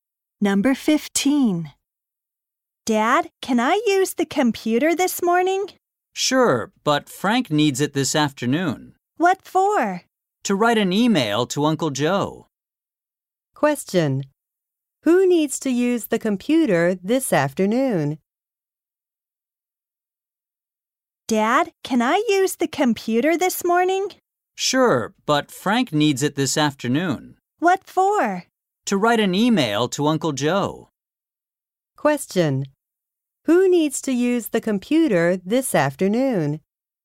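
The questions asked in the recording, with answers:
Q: Who needs to use the computer this afternoon?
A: Frank.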